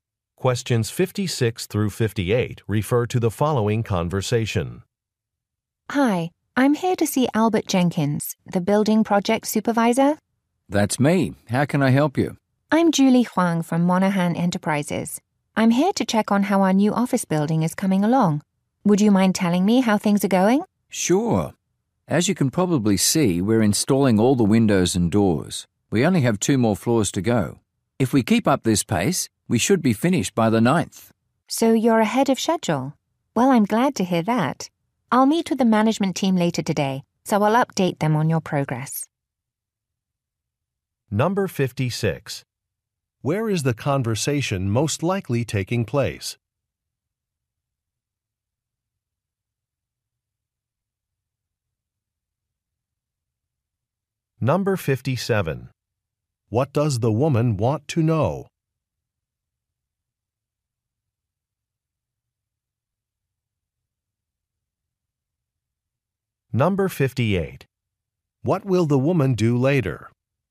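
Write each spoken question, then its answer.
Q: Where is the conversation most likely taking place?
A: At a construction site

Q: What does the woman want to know?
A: How the building work is going

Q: What will the woman do later?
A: Update the management team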